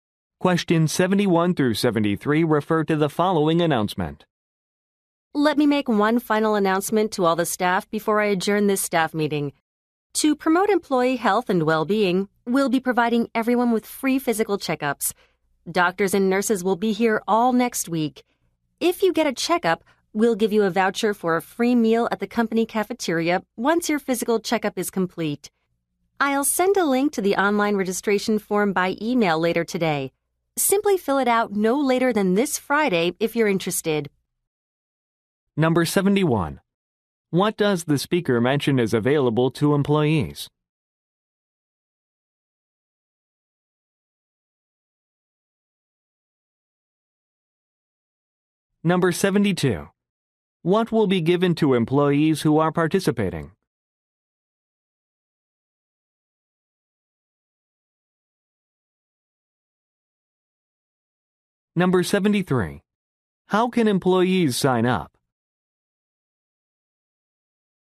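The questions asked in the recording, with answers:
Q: What does the speaker mention is available to employees?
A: Free physical checkups

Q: What will be given to employees who are participating?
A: A voucher for a free meal at the company cafeteria

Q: How can employees sign up?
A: By filling out an online registration form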